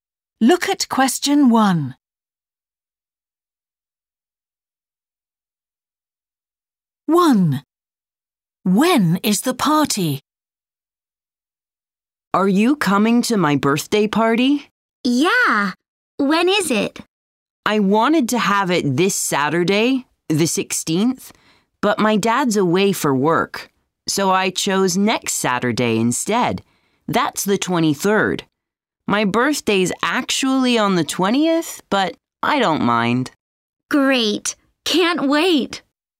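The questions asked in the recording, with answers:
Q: When is the party?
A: Saturday the 23rd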